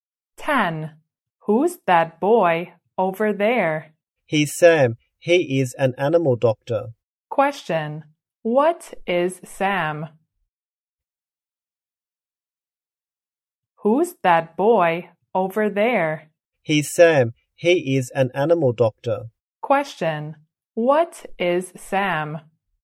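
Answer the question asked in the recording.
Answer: An animal doctor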